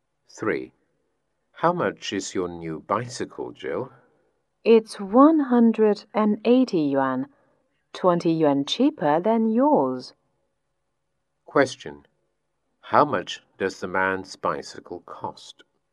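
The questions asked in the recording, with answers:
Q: How much does the man's bicycle cost?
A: 200 yuan.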